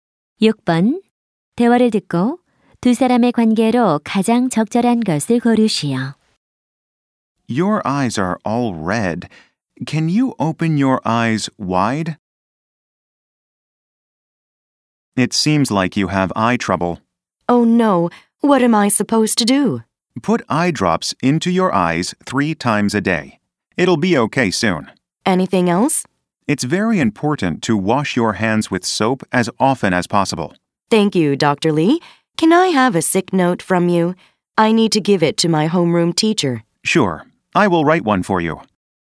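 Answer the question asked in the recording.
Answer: 의사와 환자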